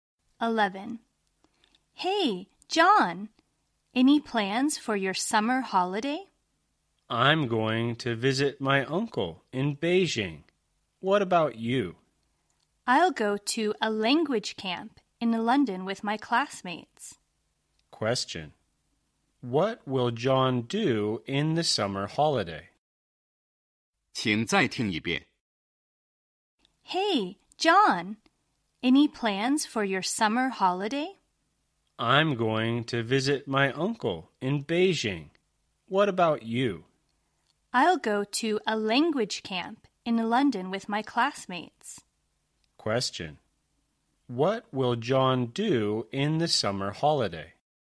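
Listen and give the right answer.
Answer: Visit his uncle in Beijing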